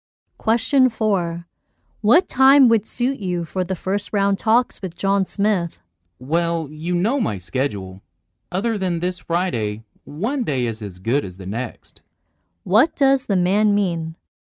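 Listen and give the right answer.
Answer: Any day except this Friday is fine.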